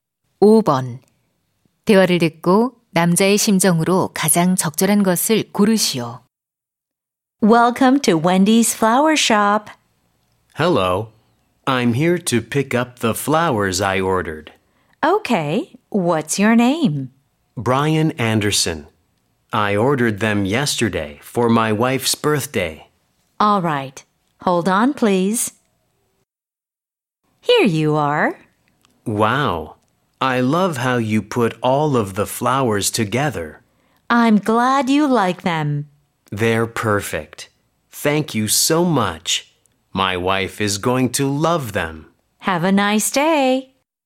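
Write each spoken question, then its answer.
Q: 대화를 듣고 남자의 심정으로 가장 적절한 것을 고르시오.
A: 만족스러운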